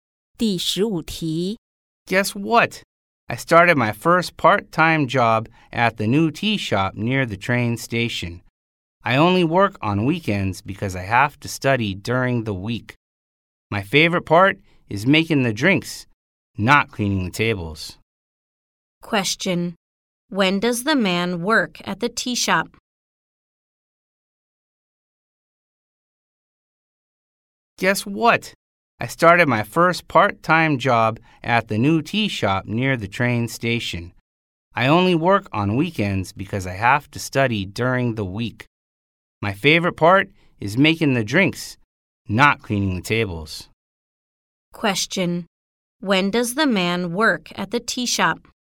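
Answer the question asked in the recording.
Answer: On weekends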